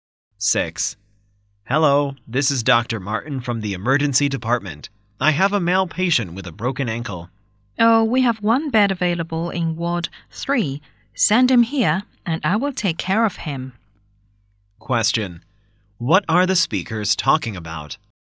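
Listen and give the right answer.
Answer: Finding a hospital bed for a patient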